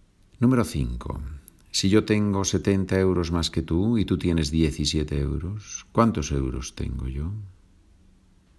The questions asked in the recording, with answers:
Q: Si yo tengo 70 euros más que tú y tú tienes 17 euros, ¿cuántos euros tengo yo?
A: Tengo 87 euros.